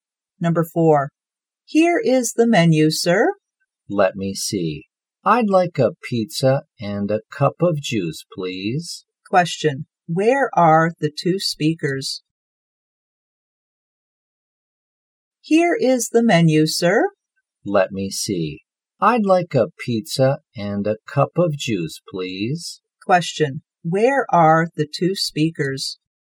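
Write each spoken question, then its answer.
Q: Where are the two speakers?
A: In a restaurant.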